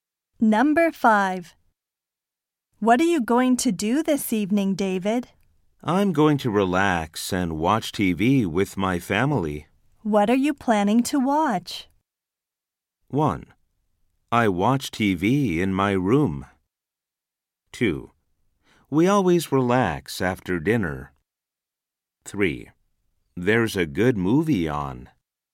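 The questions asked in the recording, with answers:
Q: What are you planning to watch?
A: 3: There's a good movie on.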